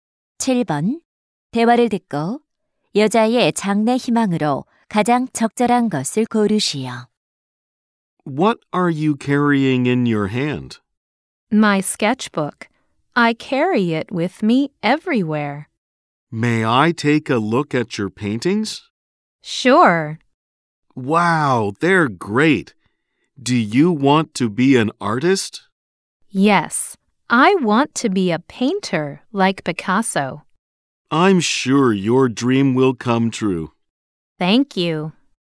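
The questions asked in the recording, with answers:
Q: 대화를 듣고 여자의 장래 희망으로 가장 적절한 것을 고르시오.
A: 화가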